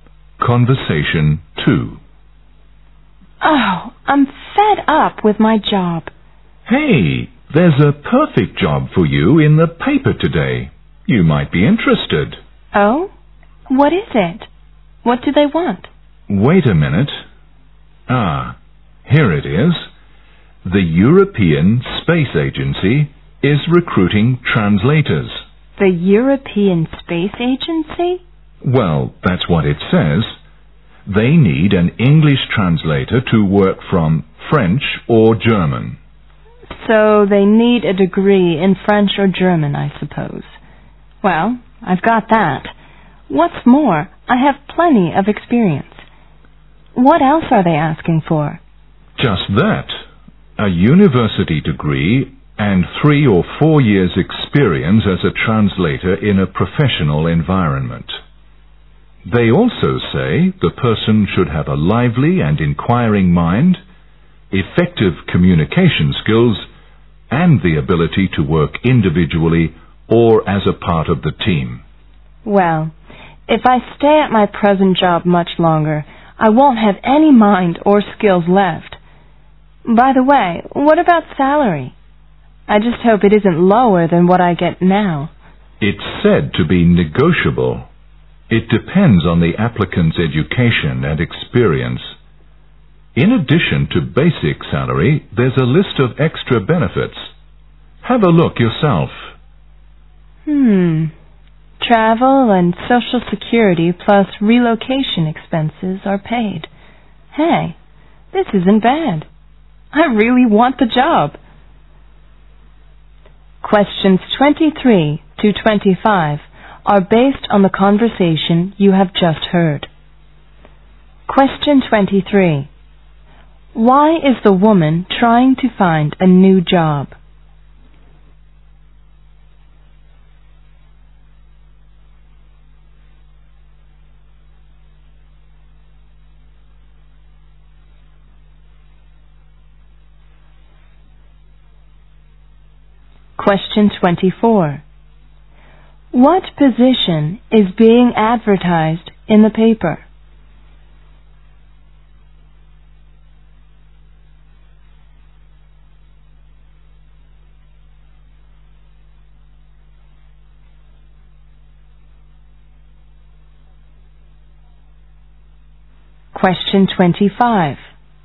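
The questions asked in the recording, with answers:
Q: Why is the woman trying to find a new job?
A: She is fed up with her present job

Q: What position is being advertised in the paper?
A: A translator at the European Space Agency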